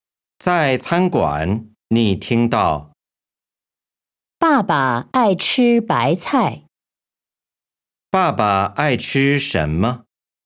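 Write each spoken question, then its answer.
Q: 爸爸爱吃什么?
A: 白菜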